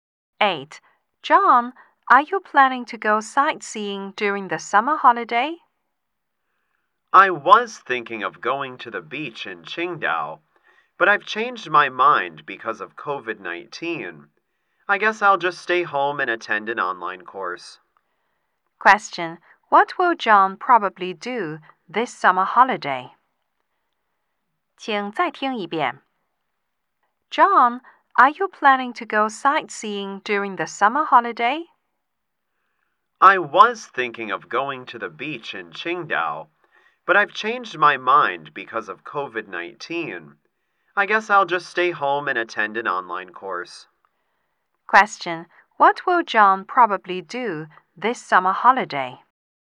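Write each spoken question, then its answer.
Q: What will John probably do this summer holiday?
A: Stay home and attend an online course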